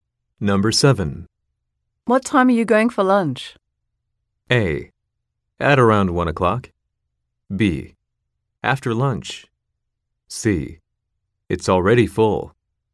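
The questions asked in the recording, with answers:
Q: What time are you going for lunch?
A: A: At around 1 o'clock.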